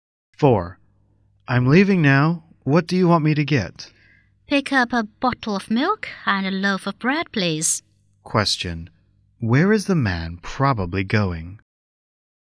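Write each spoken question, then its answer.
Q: Where is the man probably going?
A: To a grocery store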